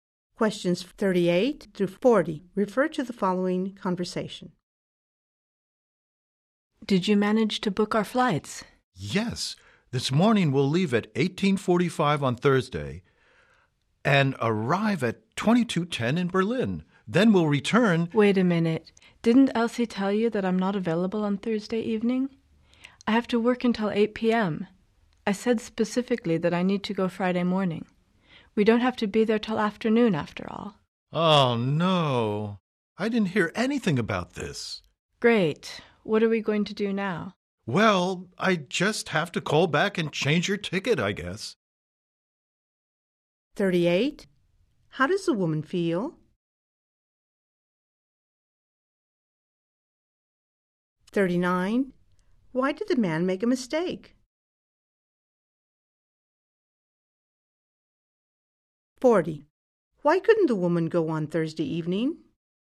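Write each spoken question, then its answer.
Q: Why did the man make a mistake?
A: Elsie didn't tell him the woman wasn't available Thursday

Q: Why couldn't the woman go on Thursday evening?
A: She has to work until 8 p.m.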